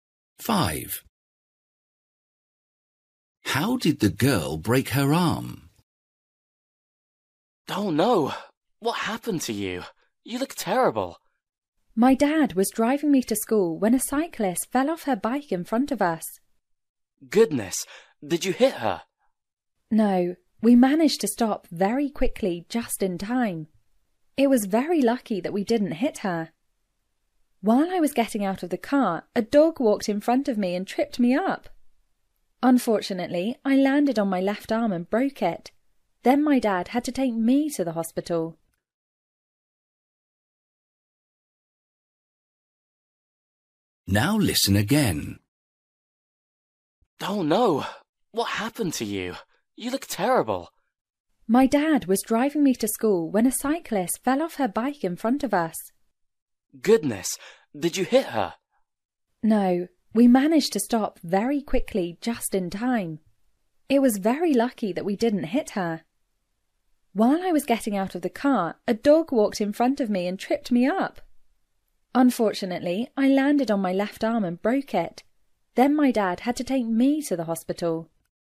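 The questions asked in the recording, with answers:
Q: How did the girl break her arm?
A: A dog tripped her up as she got out of the car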